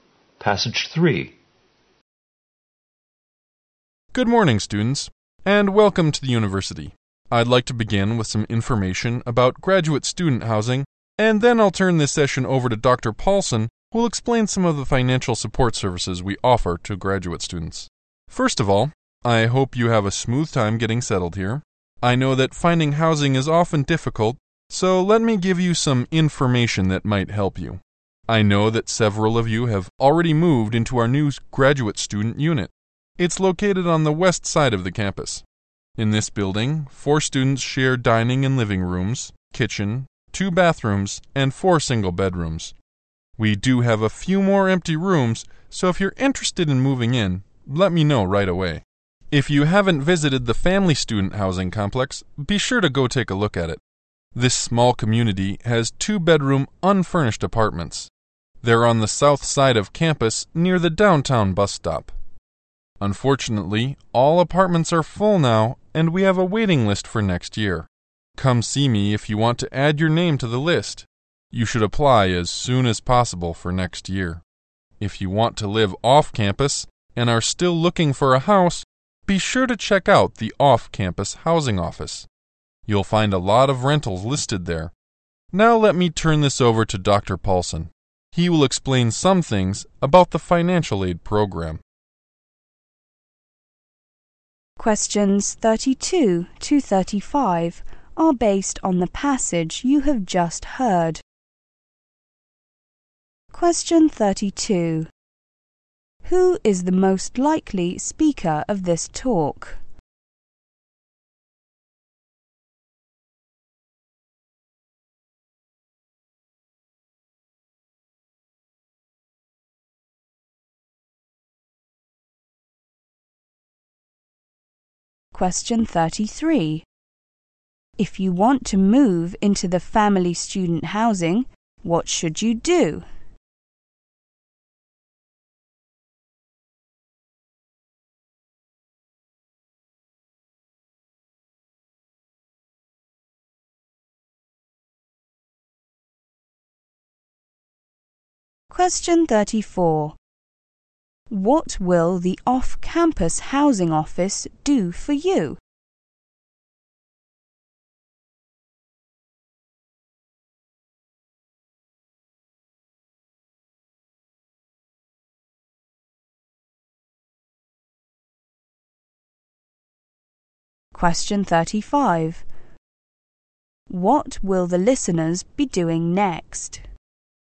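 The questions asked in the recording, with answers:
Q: If you want to move into the family student housing, what should you do?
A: Put your name on the waiting list as soon as possible

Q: What will the off-campus housing office do for you?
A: Provide lists of rentals

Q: What will the listeners be doing next?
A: Listening to Dr. Paulson explain the financial aid program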